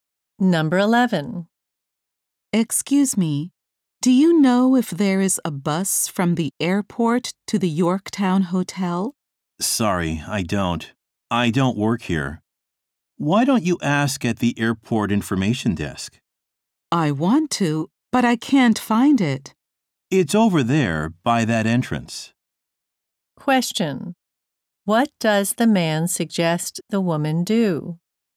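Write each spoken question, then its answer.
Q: What does the man suggest the woman do?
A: Ask at the airport information desk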